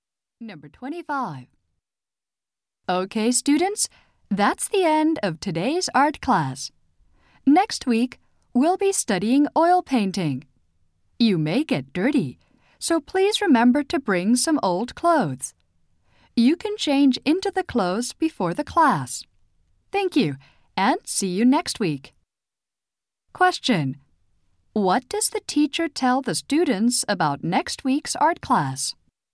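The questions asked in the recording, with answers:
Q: Question: What does the teacher tell the students about next week's art class?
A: Bring old clothes.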